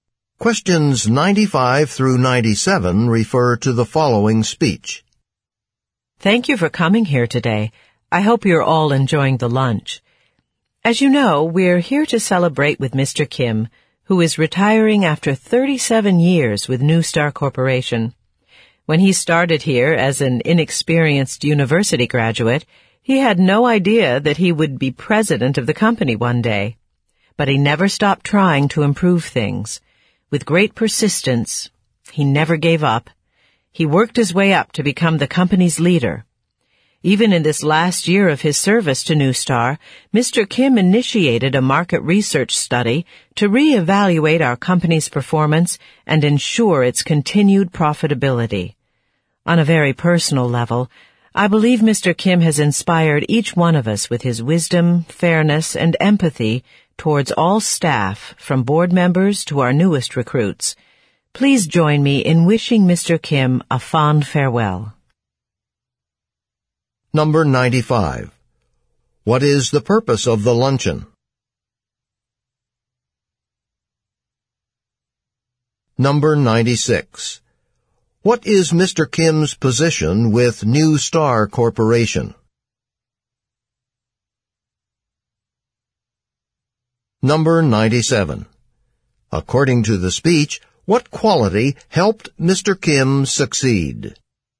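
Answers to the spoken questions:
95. To celebrate Mr. Kim's retirement
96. President
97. Persistence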